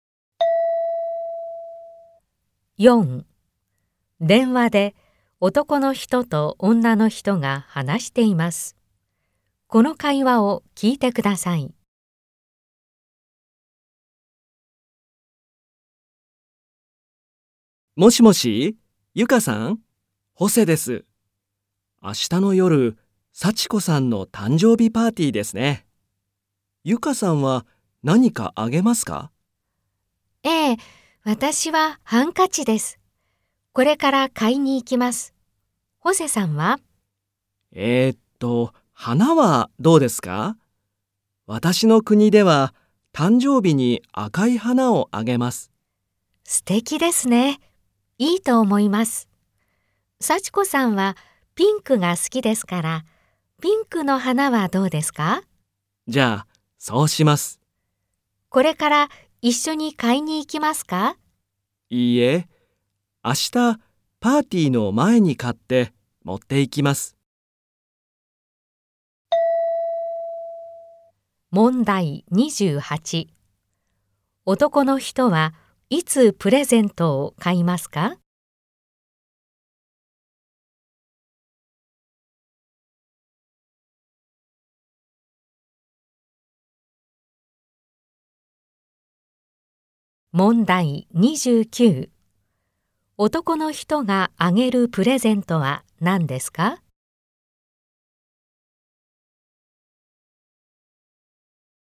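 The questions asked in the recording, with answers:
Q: 男の人はいつプレゼントを買いますか?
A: 明日パーティーの前

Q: 男の人があげるプレゼントは何ですか?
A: ピンクの花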